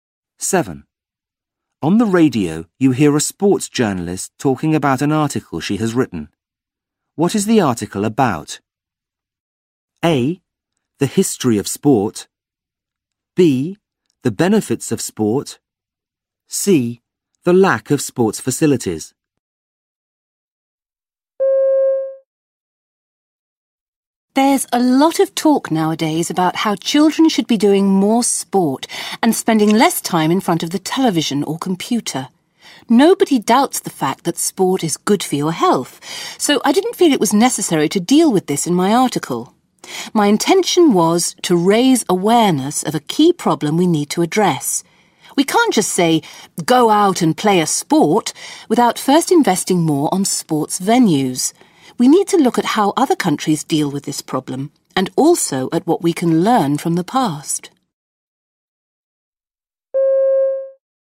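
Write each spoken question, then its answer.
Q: What is the article about?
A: C: The lack of sports facilities.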